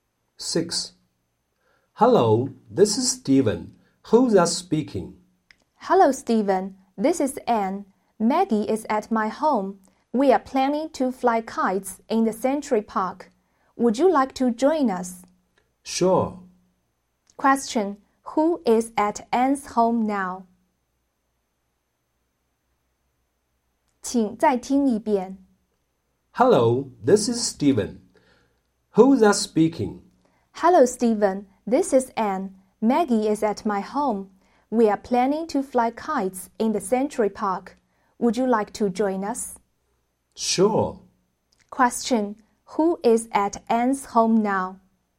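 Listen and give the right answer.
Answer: Maggie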